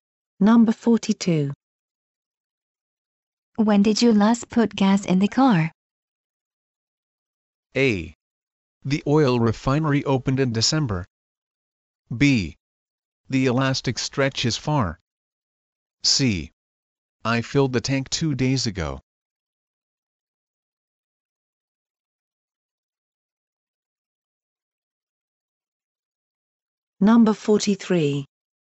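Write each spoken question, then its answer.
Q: When did you last put gas in the car?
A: C: I filled the tank 2 days ago.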